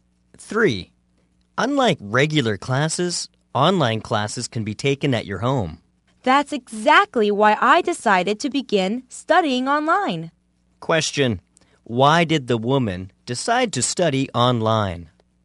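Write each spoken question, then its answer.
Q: Why did the woman decide to study online?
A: Because online classes can be taken at home.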